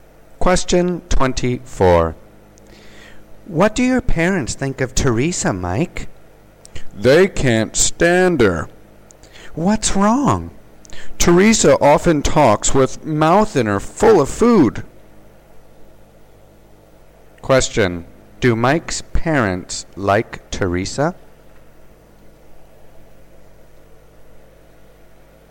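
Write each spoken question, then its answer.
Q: Do Mike's parents like Teresa?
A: No, they can't stand her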